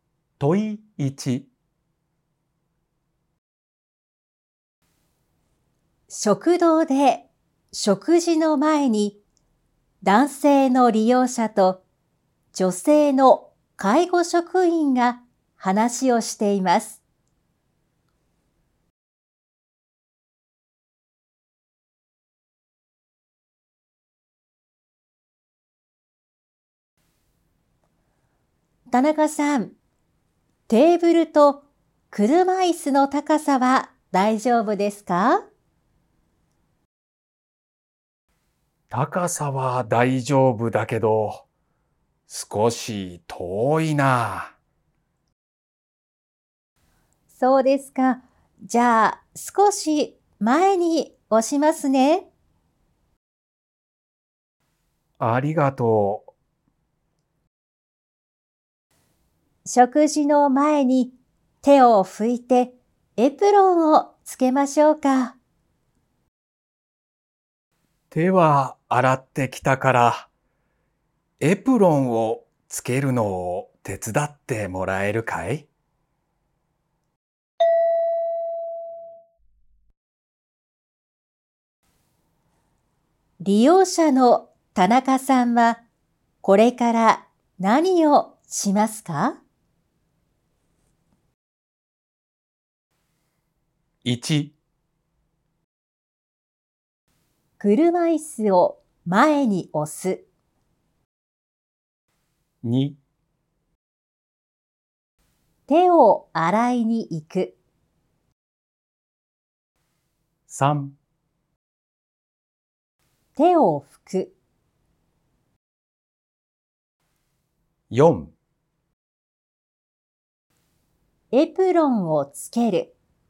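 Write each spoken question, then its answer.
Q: 利用者の田中さんはこれから何をしますか?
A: 4: エプロンをつける。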